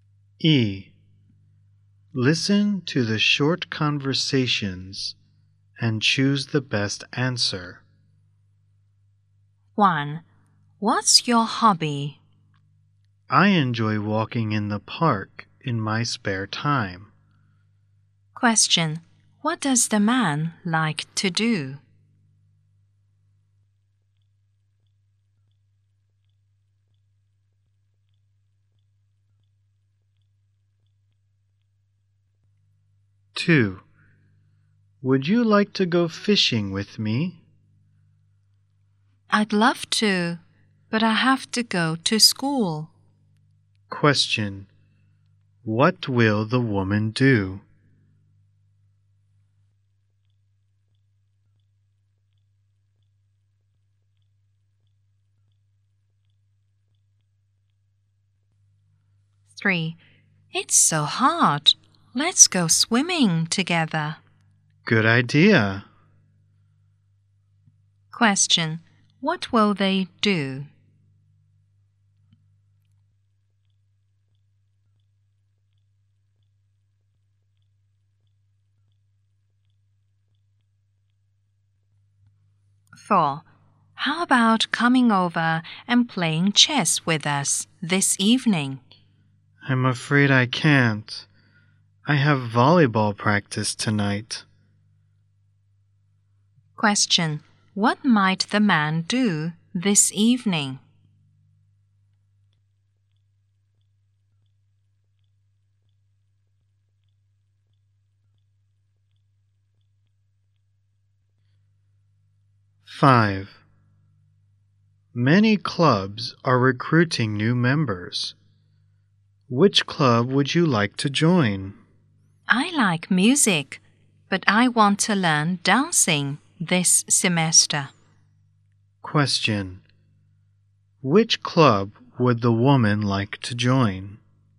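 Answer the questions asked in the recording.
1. Walk in the park
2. Go to school
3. Go swimming
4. Have volleyball practice
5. The dancing club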